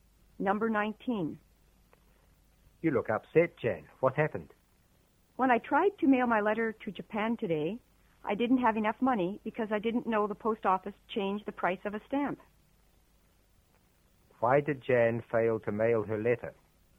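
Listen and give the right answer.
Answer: She didn't have enough money because the price of a stamp had changed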